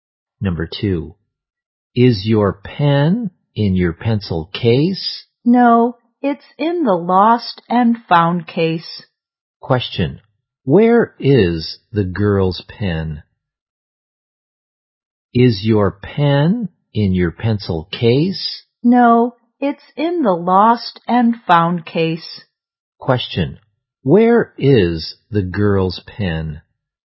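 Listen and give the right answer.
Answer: In the lost and found case.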